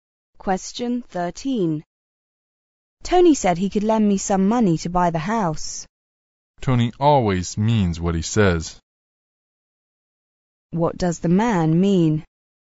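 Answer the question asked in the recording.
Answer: Tony will really lend the money.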